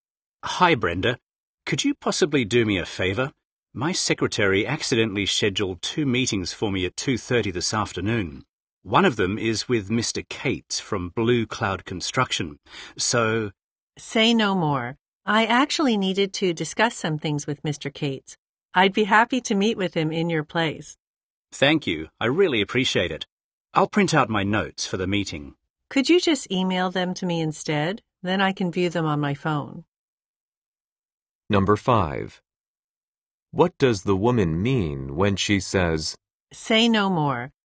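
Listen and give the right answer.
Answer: She already understands and agrees to help by meeting Mr. Cates in his place.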